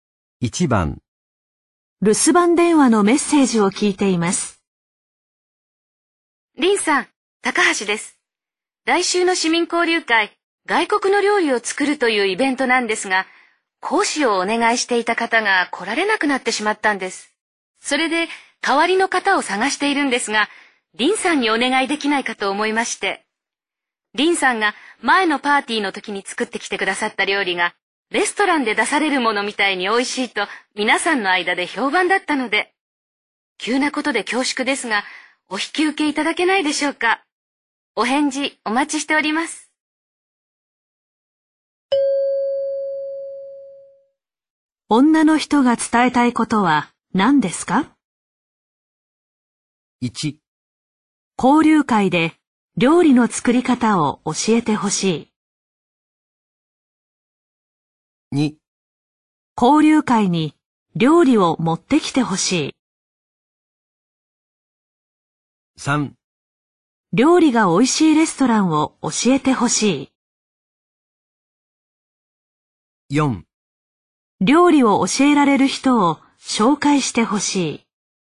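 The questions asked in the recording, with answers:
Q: 女の人が伝えたいことは何ですか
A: 1: 交流会で料理の作り方を教えてほしい。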